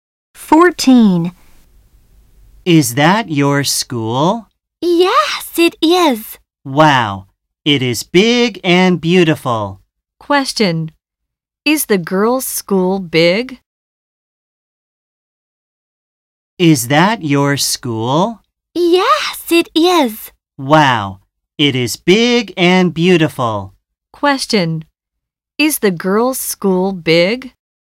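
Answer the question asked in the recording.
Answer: Yes, it is.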